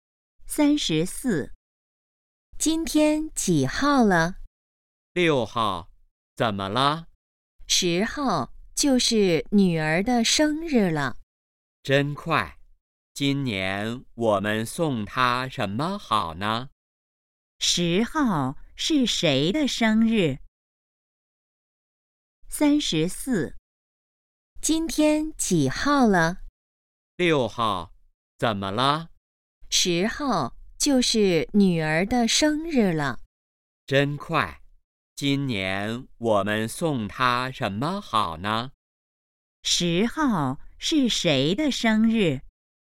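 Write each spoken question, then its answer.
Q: 10号是谁的生日?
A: 女儿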